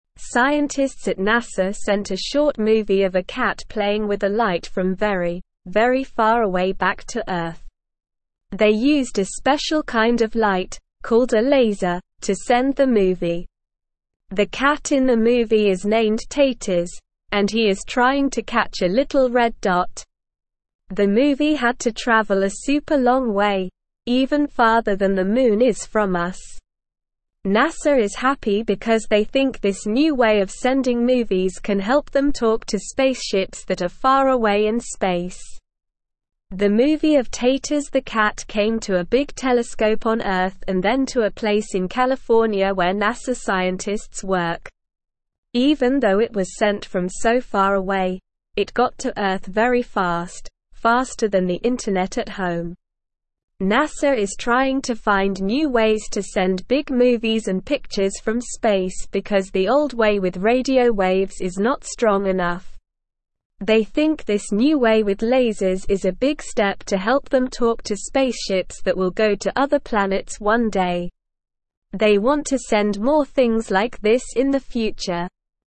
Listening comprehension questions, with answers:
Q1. Scientists at NASA sent a short movie of a cat playing with a (1)______ from very, very far away back to Earth.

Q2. They used a (2)______ kind of light, called a laser, to send the movie.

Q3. The movie had to travel a super long way, even farther than the (3)______ is from us.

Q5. The movie of Taters the cat came to a big telescope on Earth and then to a place in (5)______ where NASA scientists work.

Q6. NASA is (6)______ to find new ways to send big movies and pictures from space because the old way with radio waves is not strong enough.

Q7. They think this new way with lasers is a big (7)______ to help them talk to spaceships that will go to other (8)______ one day.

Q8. They think this new way with lasers is a big (7)______ to help them talk to spaceships that will go to other (8)______ one day.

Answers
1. light
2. special
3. moon
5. California
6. trying
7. step
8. planets

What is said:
Scientists at NASA sent a short movie of a cat playing with a light from very, very far away back to Earth. They used a special kind of light, called a laser, to send the movie. The cat in the movie is named Taters, and he is trying to catch a little red dot. The movie had to travel a super long way, even farther than the moon is from us. NASA is happy because they think this new way of sending movies can help them talk to spaceships that are far away in space.
The movie of Taters the cat came to a big telescope on Earth and then to a place in California where NASA scientists work. Even though it was sent from so far away, it got to Earth very fast, faster than the internet at home. NASA is trying to find new ways to send big movies and pictures from space because the old way with radio waves is not strong enough. They think this new way with lasers is a big step to help them talk to spaceships that will go to other planets one day. They want to send more things like this in the future.

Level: Level 1